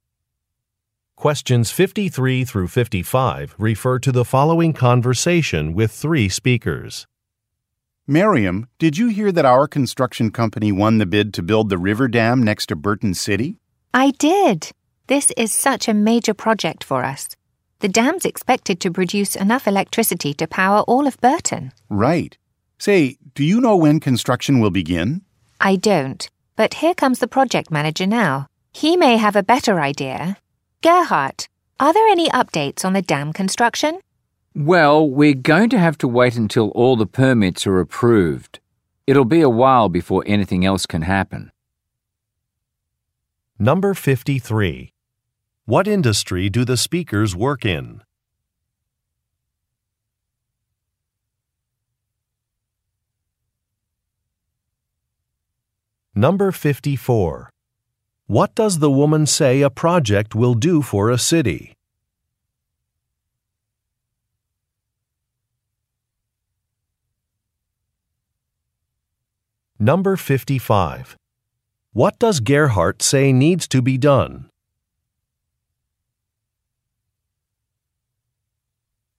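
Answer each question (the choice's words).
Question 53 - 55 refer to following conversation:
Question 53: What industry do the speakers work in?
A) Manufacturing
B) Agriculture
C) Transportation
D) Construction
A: Construction

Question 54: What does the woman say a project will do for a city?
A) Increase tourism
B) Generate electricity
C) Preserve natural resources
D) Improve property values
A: Generate electricity

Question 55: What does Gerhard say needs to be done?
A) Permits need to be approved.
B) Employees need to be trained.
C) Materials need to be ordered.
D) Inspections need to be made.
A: Permits need to be approved.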